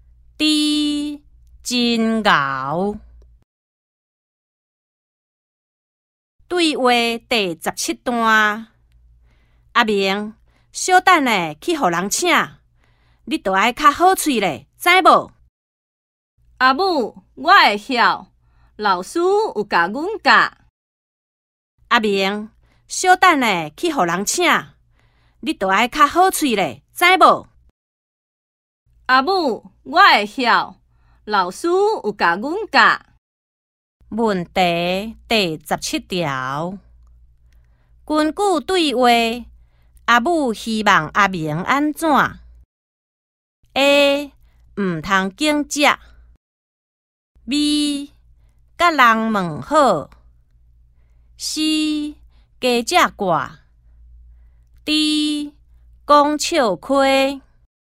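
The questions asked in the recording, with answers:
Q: 根据对话,阿母希望阿明安怎 ?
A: B: 甲人问好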